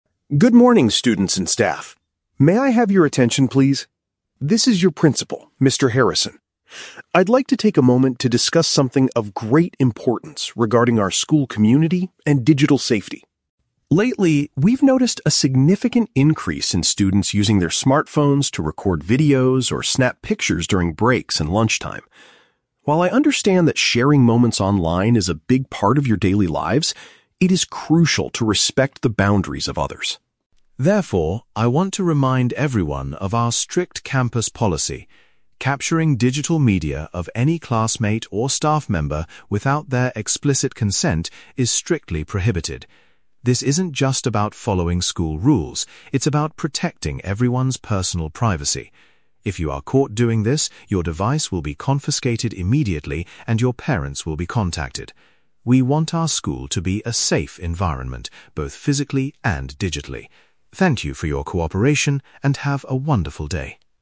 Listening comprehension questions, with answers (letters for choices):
Listen to the school principal's announcement and choose the correct answer (A, B, or C) for each question.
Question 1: What is the main purpose of the principal's announcement?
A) To introduce a new school photography club.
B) To warn students about a recent cyberbullying incident.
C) To remind students about the rules for taking media on campus.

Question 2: According to the principal, what must students do before taking a photo of someone?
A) Ask a teacher for permission.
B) Get clear agreement from the person being photographed.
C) Wait until the break or lunchtime is over.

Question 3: What will happen if a student breaks this privacy rule?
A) They will lose their phone and their family will be informed.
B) They will be banned from using the internet at school.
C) They will have to pay a fine to the school office.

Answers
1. C
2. B
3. A

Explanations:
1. The principal talks about the strict campus policy regarding "capturing digital media" (which means taking photos or videos). Why the traps are wrong: Option A is plausible but not mentioned. Option B is a trap; the topic relates to internet/phones and safety, but the principal does not mention any specific "cyberbullying incident".
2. The script says students cannot take photos "without their explicit consent". "Explicit consent" means getting clear agreement from the person. Why the traps are wrong: Option A is wrong because they don't need a teacher's permission, they need the person's permission. Option C is a trap that uses the words "break and lunchtime" from the audio, but in the wrong context.
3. The principal states, "your device will be confiscated immediately, and your parents will be contacted." "Device" refers to the phone, "confiscated" means taken away (lose their phone), and "parents contacted" matches "family will be informed". Why the traps are wrong: Options B and C might sound like standard school punishments, but they are not mentioned in the audio.

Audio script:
"Good morning, students and staff. May I have your attention, please? This is your Principal, Mr. Harrison. I'd like to take a moment to discuss something of great importance regarding our school community and digital safety.
Lately, we've noticed a significant increase in students using their smartphones to record videos or snap pictures during breaks and lunchtime. While I understand that sharing moments online is a big part of your daily lives, it is crucial to respect the boundaries of others.
Therefore, I want to remind everyone of our strict campus policy. Capturing digital media of any classmate or staff member without their explicit consent is strictly prohibited. This isn't just about following school rules; it's about protecting everyone's personal privacy. If you are caught doing this, your device will be confiscated immediately, and your parents will be contacted. We want our school to be a safe environment, both physically and digitally. Thank you for your cooperation, and have a wonderful day."